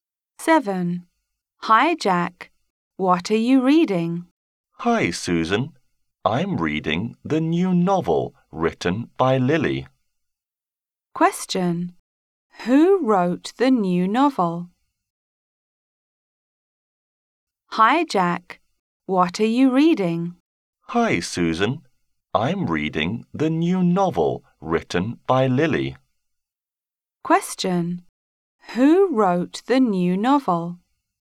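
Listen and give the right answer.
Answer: Lily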